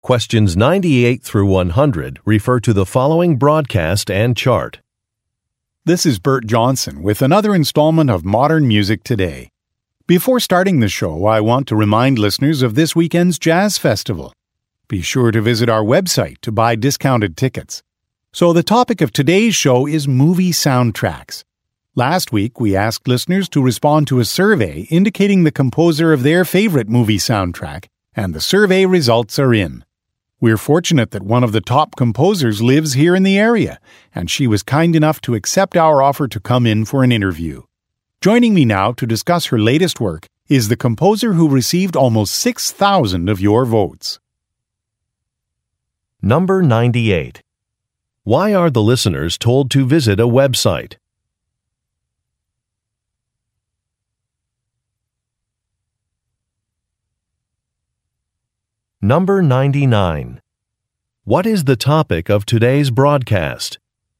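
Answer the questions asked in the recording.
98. To buy discounted tickets for this weekend's Jazz Festival
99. Movie soundtracks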